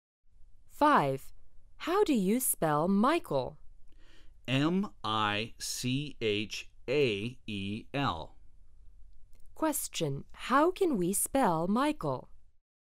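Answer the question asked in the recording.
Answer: M-I-C-H-A-E-L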